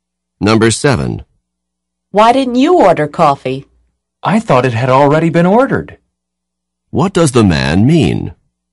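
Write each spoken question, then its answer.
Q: What does the man mean?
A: He thought the coffee had already been ordered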